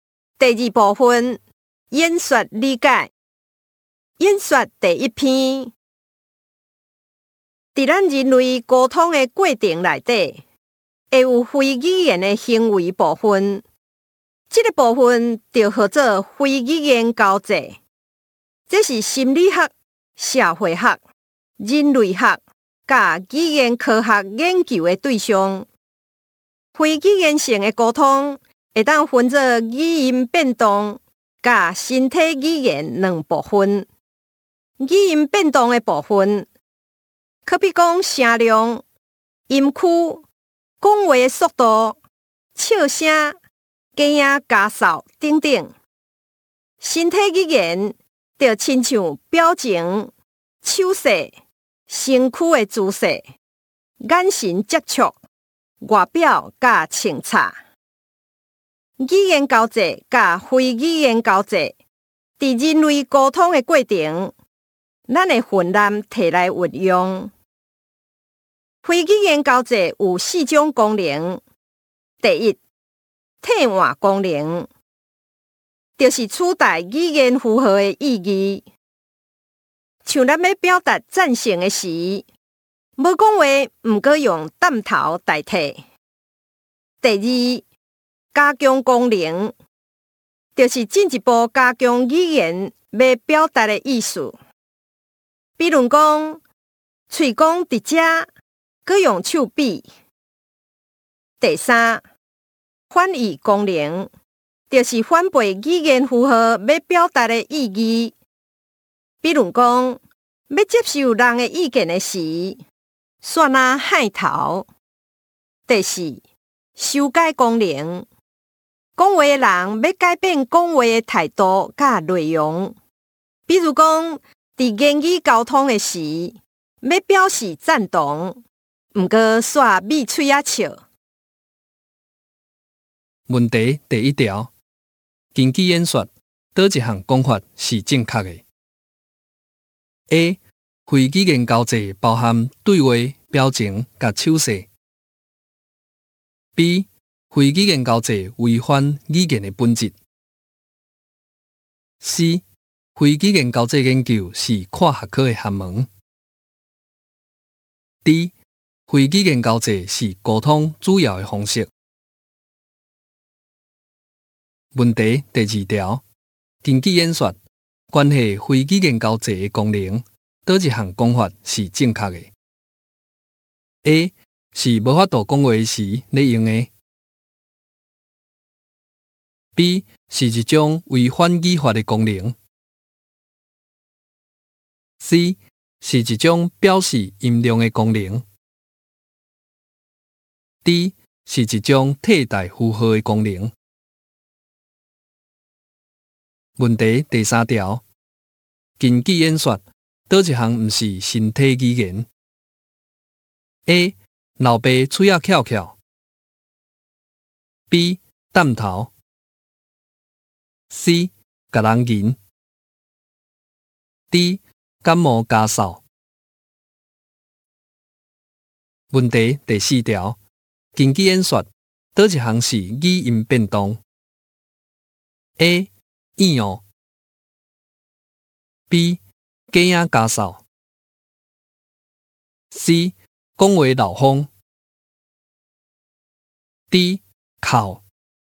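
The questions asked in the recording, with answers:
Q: 根据演说,哪一项讲法是正确的 ?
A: C: 非语言交际研究是跨学科的学问

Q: 根据演说,关系非语言交际的功能,哪一项讲法是正确的 ?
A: D: 是一种替代符号的功能

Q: 根据演说,哪一项不是身体语言 ?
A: D: 感冒咳嗽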